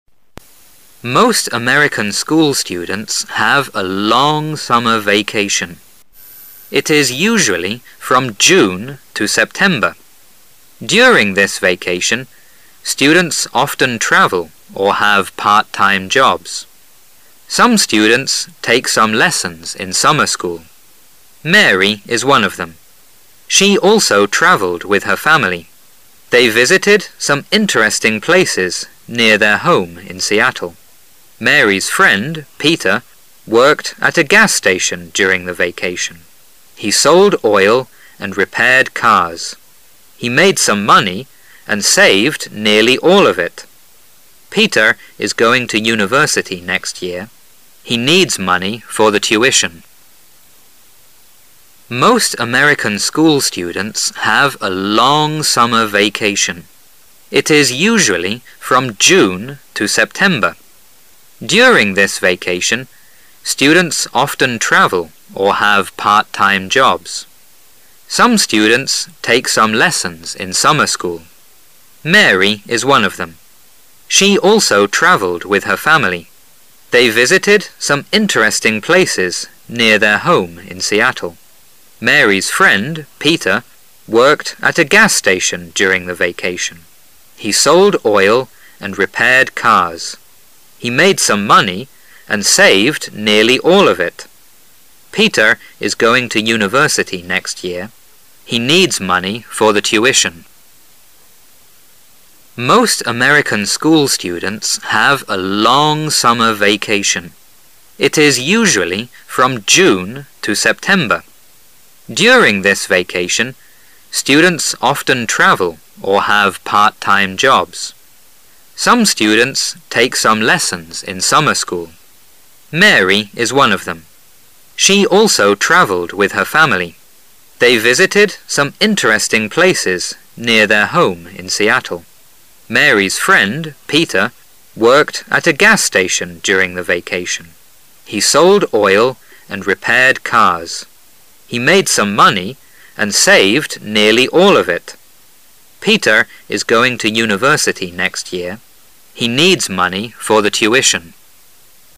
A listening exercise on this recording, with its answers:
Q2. During this vacation, students often travel or have 2 .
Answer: part-time jobs

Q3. They visited some 3 places near their home in Seattle.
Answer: interesting

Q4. He sold oil and 4 cars.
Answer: repaired

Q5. He made some money and saved 5 all of it.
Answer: nearly

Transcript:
Now the passage will begin Most American school students have a long summer vacation.
It is usually from June to Sep tember. During this vacation, students often travel or have part - time jobs. Some students take some lessons in summer school. Mary is one of them. She also traveled with her family. They visited some interesting places near their home in Seattle. Mary' s friend, Peter, worked at a gas station during the vacation. He sold oil and repaired cars. He made some money and saved nearly all of it. Peter is going to university next year. He needs money for the tuition.